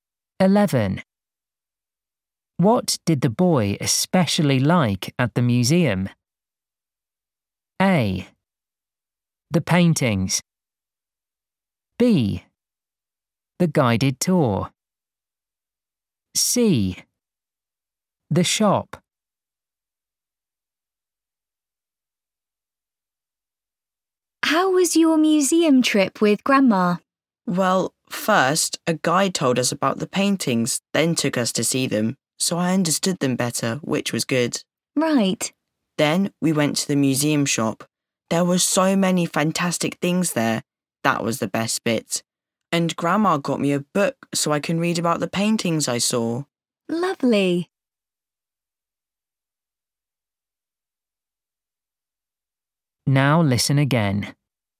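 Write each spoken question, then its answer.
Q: What did the boy especially like at the museum?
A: C: The shop.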